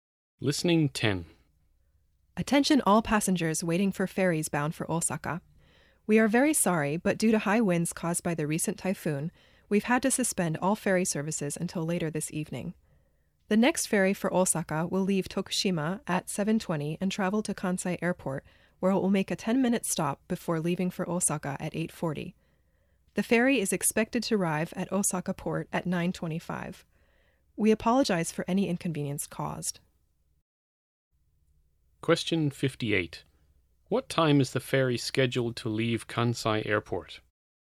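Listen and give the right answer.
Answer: 8:40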